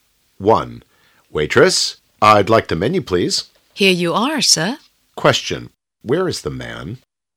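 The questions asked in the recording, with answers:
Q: Question, where is the man?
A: In a restaurant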